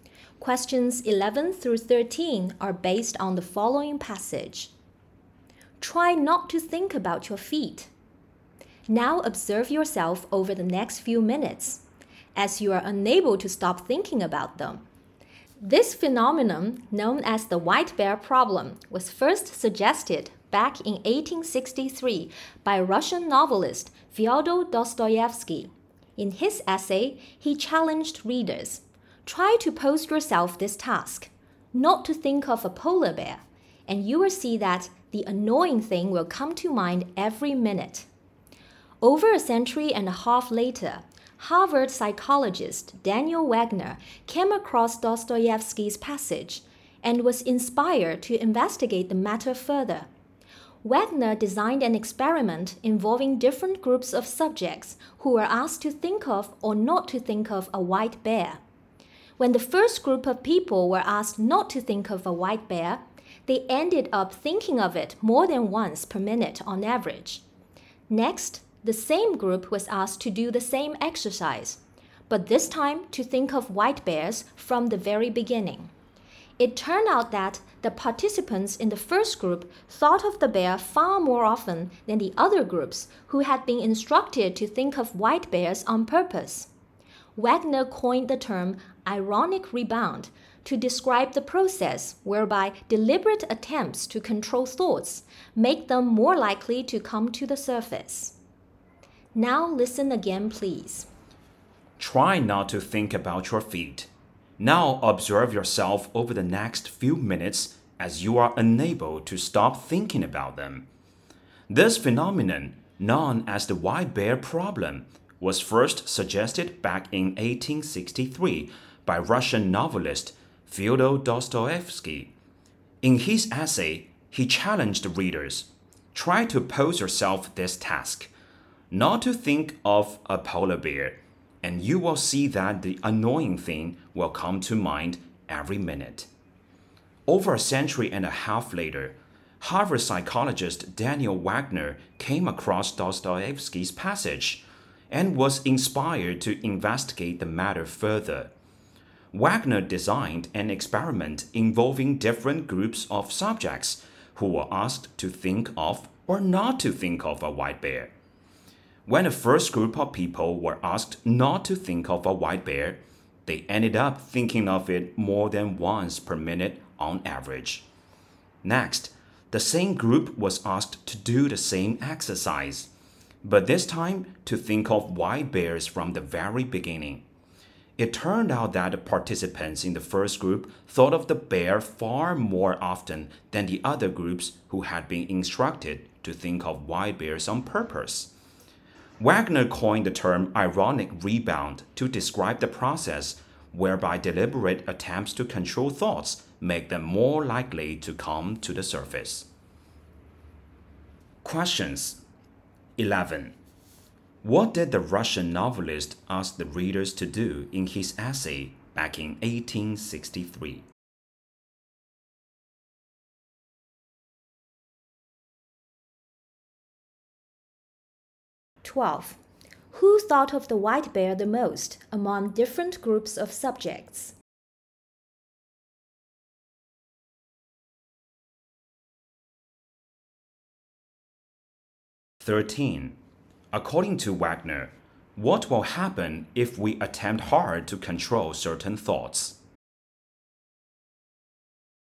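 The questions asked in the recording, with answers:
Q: What did the Russian novelist ask the readers to do in his essay back in 1863?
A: Not to think of a polar bear

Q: Who thought of the white bear the most among different groups of subjects?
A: The first group, told not to think of it

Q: According to Wagner, what will happen if we attempt hard to control certain thoughts?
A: The thoughts will come to mind more often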